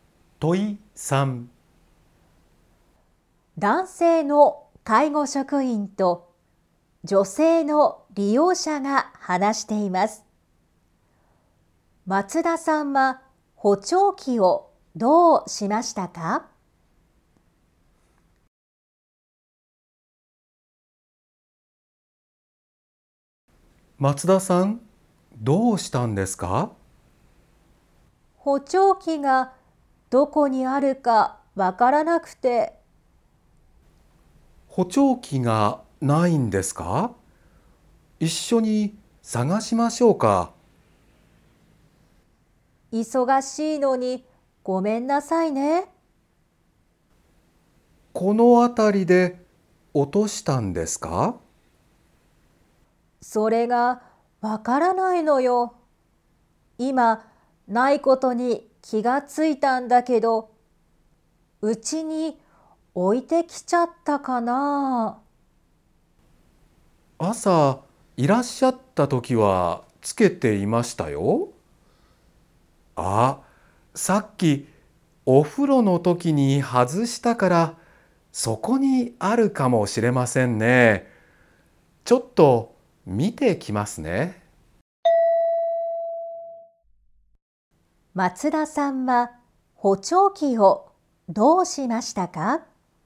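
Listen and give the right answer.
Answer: お風呂のときに外した(お風呂に置いてきた)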